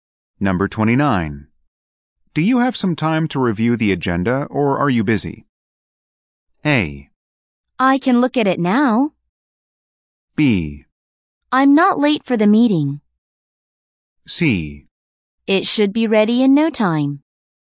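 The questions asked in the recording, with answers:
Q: Do you have some time to review the agenda or are you busy?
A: A: I can look at it now.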